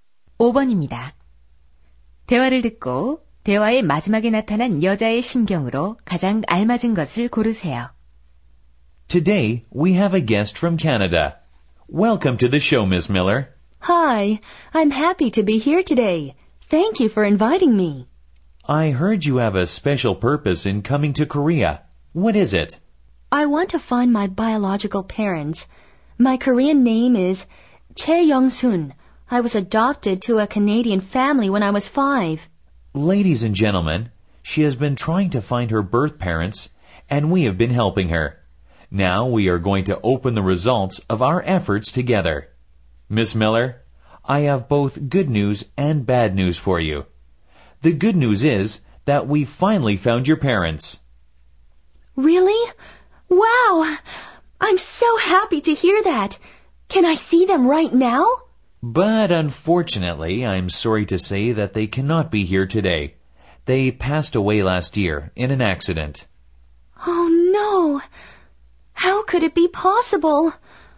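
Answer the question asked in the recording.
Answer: 슬프고 충격받은 심경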